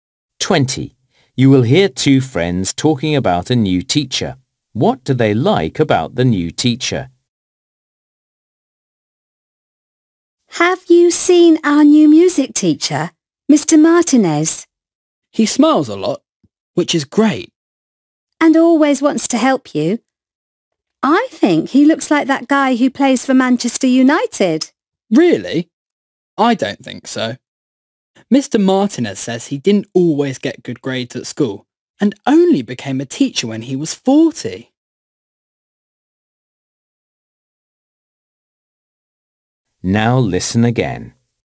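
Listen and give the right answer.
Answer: He smiles a lot and always wants to help.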